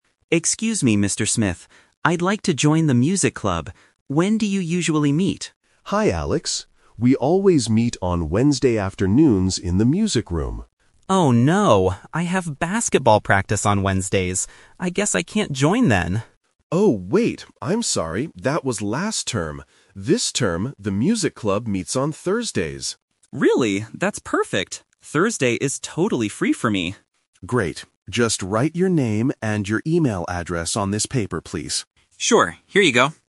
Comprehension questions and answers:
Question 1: When does the Music Club meet this term?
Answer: On Thursdays

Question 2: Why was Alex worried at first?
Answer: He had basketball practice at the same time.

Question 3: What does Mr. Smith ask Alex to write on the paper?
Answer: His name and email address

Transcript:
Alex: Excuse me, Mr. Smith. I'd like to join the Music Club. When do you usually meet?
Mr. Smith: Hi, Alex. We always meet on Wednesday afternoons in the music room.
Alex: Oh no... I have basketball practice on Wednesdays. I guess I can't join then.
Mr. Smith: Oh, wait! I'm sorry, that was last term. This term, the Music Club meets on Thursdays.
Alex: Really? That's perfect! Thursday is totally free for me.
Mr. Smith: Great. Just write your name and your email address on this paper, please.
Alex: Sure. Here you go.